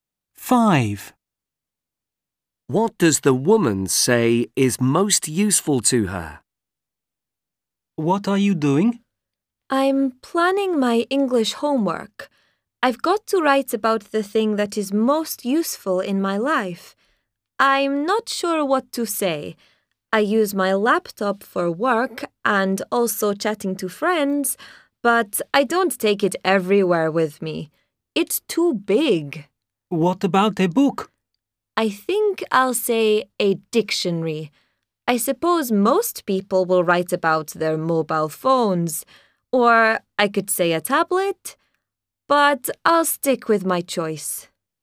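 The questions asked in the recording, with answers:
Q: What does the woman say is most useful to her?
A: A dictionary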